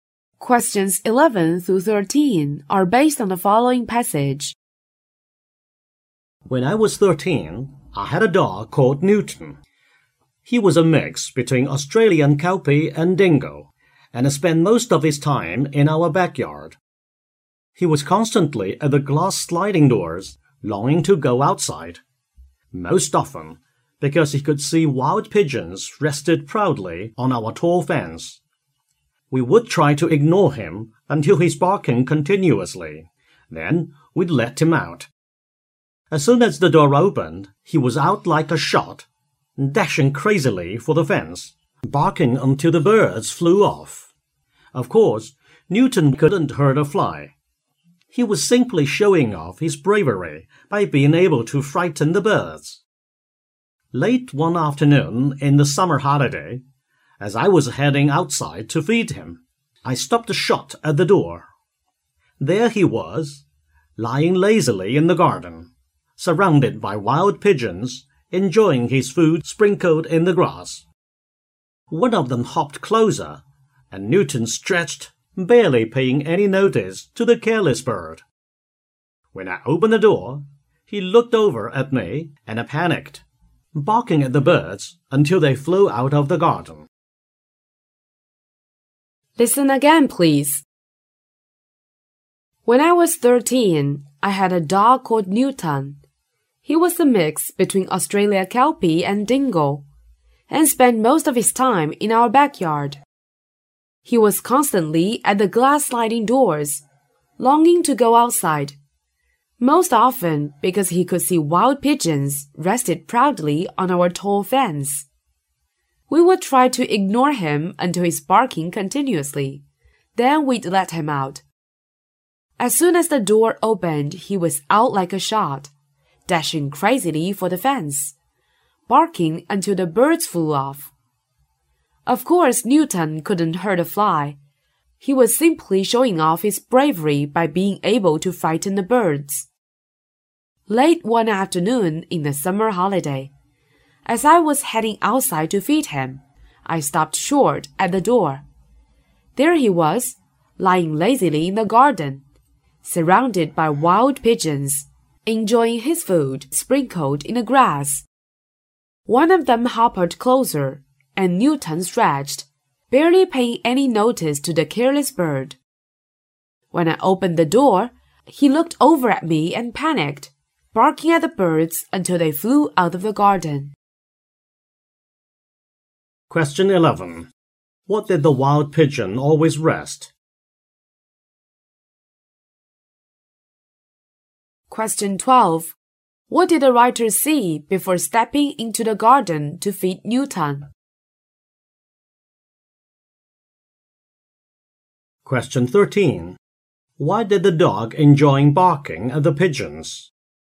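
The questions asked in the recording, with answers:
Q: What did the wild pigeon always rest?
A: On the tall fence

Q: What did the writer see before stepping into the garden to feed Newton?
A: Newton lying lazily among the wild pigeons while they ate his food

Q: Why did the dog enjoy barking at the pigeons?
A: To show off his bravery by frightening the birds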